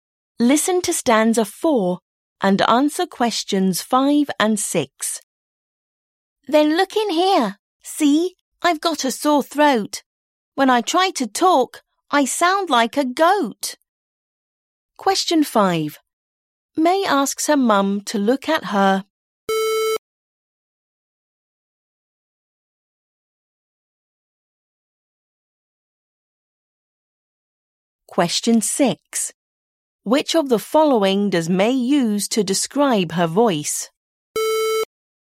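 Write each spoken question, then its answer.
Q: May asks her mum to look at her.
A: throat

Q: Which of the following does May use to describe her voice?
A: She sounds like a goat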